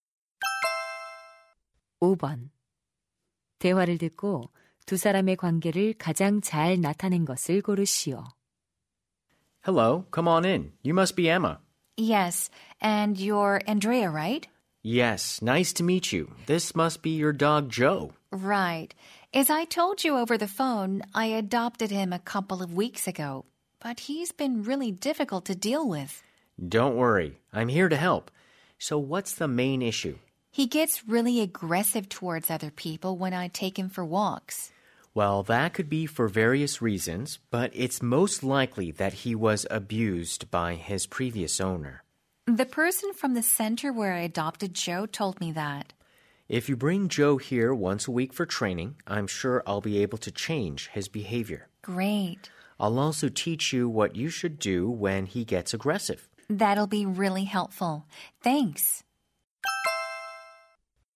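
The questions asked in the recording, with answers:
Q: 대화를 듣고 두 사람의 관계를 가장 잘 나타낸 것을 고르시오.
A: 개 훈련사 - 개 주인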